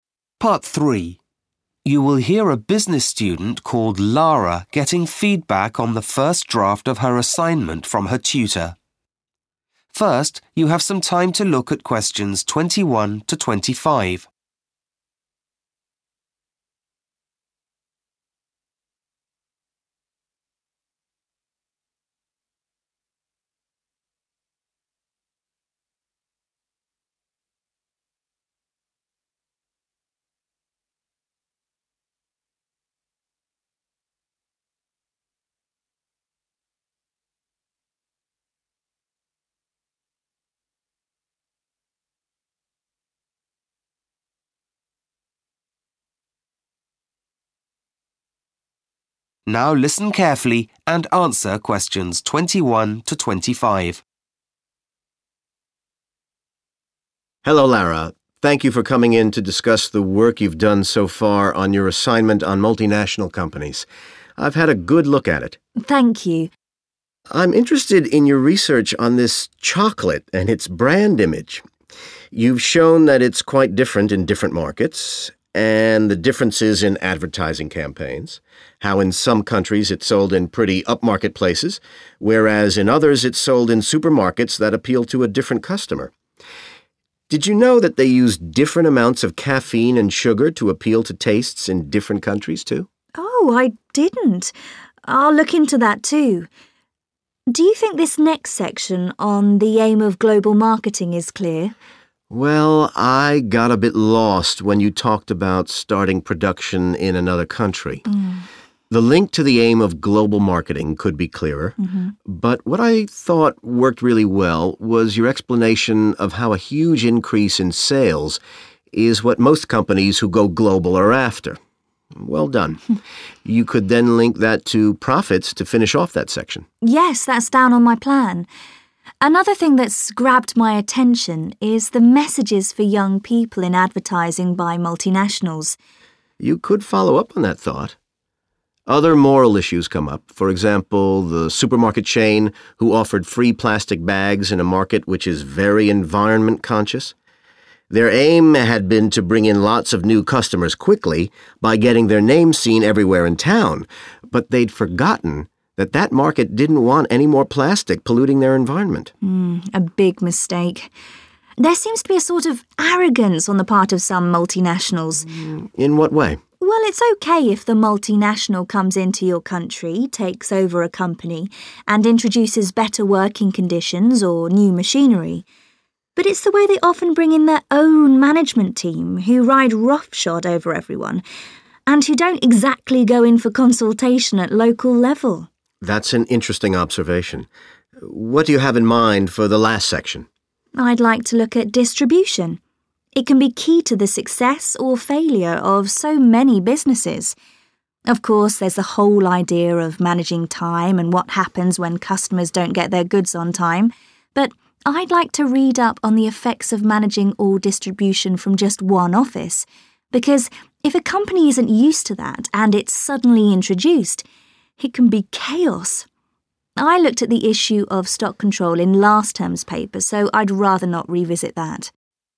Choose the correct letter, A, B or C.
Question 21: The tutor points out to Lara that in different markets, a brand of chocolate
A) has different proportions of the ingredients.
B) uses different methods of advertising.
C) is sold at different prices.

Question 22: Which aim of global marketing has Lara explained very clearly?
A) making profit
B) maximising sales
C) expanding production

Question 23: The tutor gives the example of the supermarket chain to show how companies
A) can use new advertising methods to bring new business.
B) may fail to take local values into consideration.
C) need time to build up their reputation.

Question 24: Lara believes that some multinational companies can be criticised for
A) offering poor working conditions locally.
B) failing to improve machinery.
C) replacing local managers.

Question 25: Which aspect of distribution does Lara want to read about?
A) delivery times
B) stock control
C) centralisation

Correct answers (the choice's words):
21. has different proportions of the ingredients.
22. maximising sales
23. may fail to take local values into consideration.
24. replacing local managers.
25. centralisation